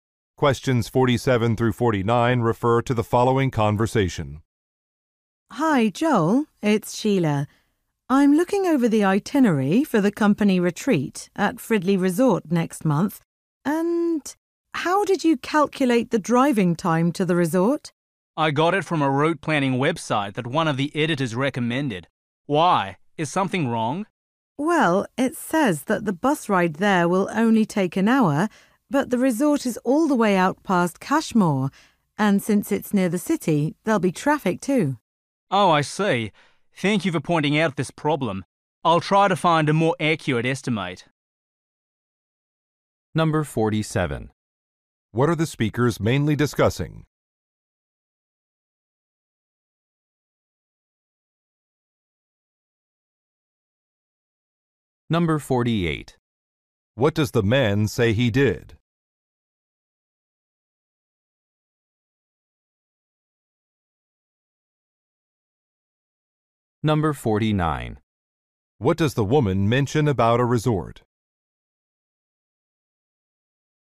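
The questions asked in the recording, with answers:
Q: What are the speakers mainly discussing?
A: The itinerary for a company retreat

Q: What does the man say he did?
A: Used a route planning website to calculate driving time

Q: What does the woman mention about a resort?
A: It is far away, past Cashmore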